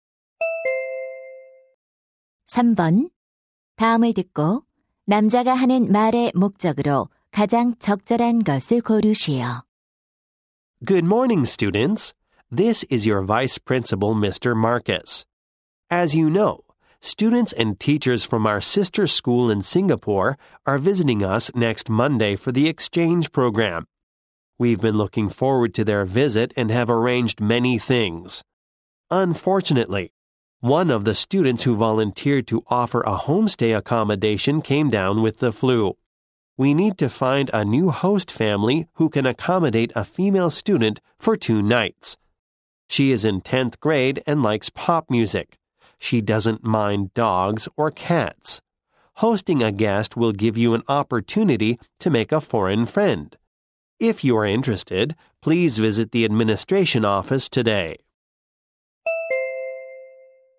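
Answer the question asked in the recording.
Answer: 교환 학생을 맡아 줄 홈스테이 가정을 모집하려고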